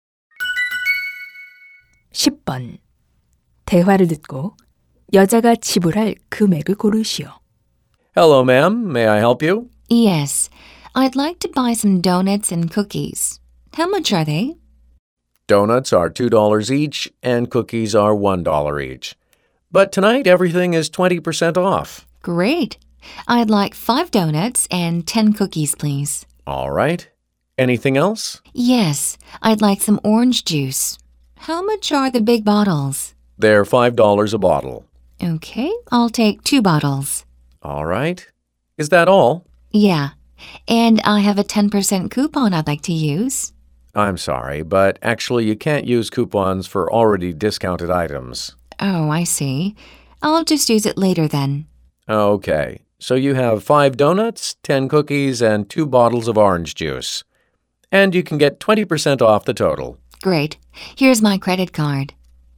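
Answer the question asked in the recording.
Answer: $24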